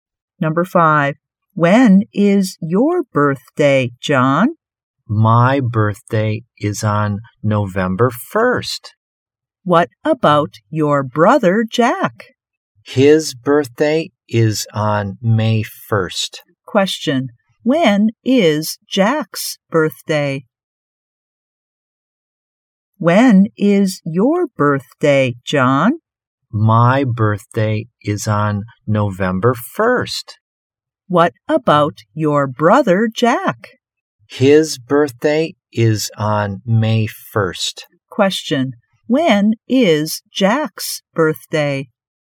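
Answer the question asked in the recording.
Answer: It's on May 1st.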